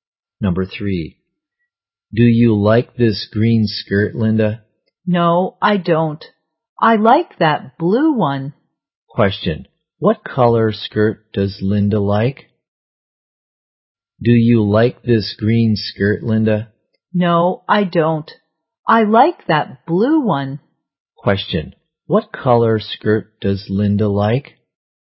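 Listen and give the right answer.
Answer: Blue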